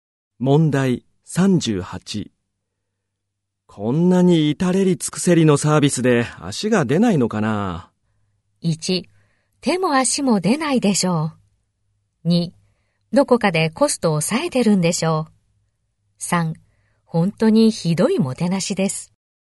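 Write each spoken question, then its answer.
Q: こんなに至れり尽くせりのサービスで足が出ないのかな?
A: 2: どこかでコストを抑えてるんでしょう。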